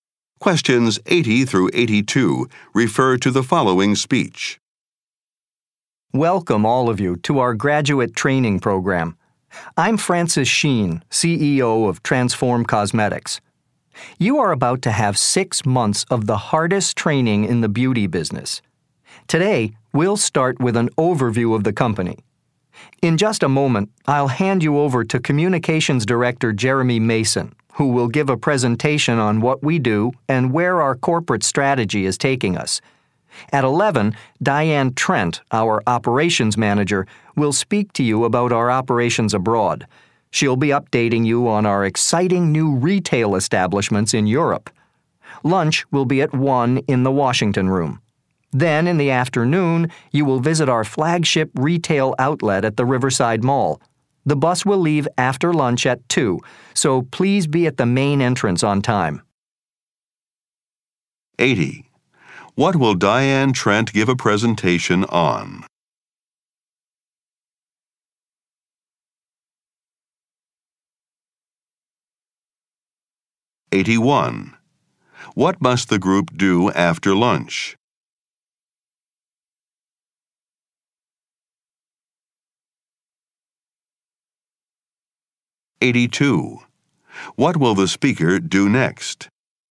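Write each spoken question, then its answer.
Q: What will Diane Trent give a presentation on?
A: The company's operations abroad, including new retail establishments in Europe

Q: What must the group do after lunch?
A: Be at the main entrance at 2 to catch the bus

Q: What will the speaker do next?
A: Hand over to Communications Director Jeremy Mason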